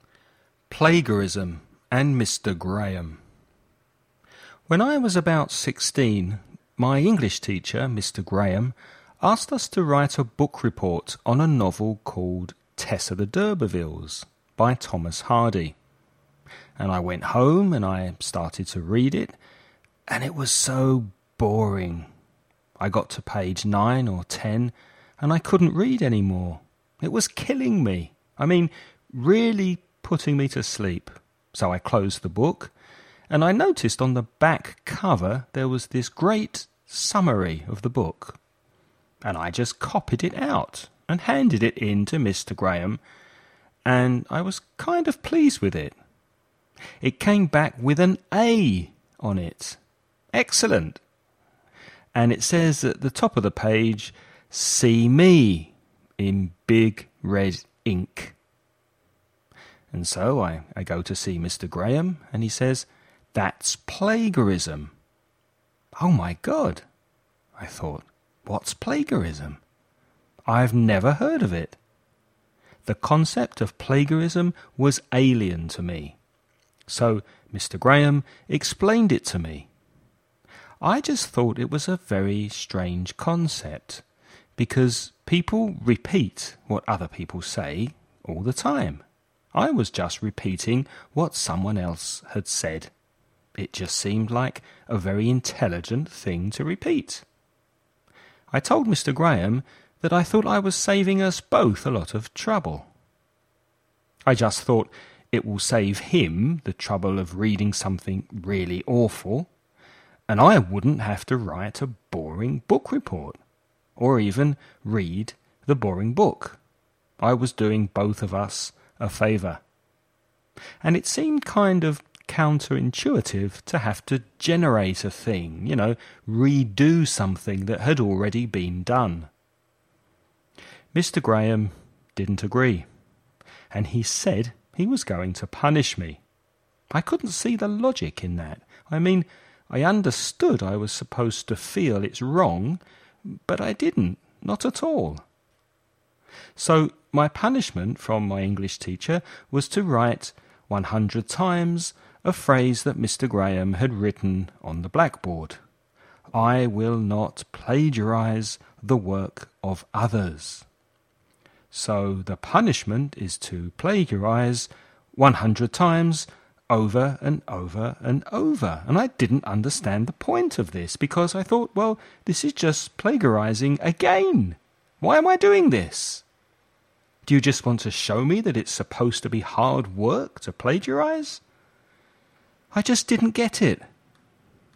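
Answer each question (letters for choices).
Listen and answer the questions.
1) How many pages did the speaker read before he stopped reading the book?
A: 9 or 10 pages

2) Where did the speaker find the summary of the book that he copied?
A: On the back cover of the book

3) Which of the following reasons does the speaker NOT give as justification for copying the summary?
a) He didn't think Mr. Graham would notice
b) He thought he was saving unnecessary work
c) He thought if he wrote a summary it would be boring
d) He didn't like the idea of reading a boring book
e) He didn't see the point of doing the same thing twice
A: a

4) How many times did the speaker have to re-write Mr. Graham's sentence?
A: 100 times

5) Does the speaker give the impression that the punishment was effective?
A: No, he didn't understand the point of it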